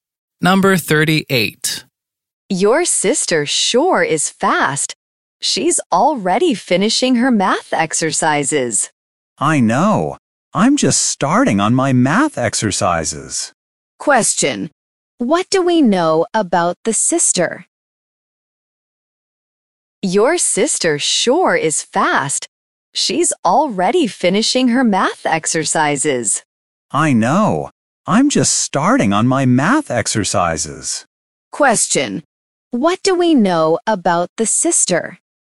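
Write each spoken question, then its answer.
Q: Question. What do we know about the sister?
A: She is fast; she's already finishing her math exercises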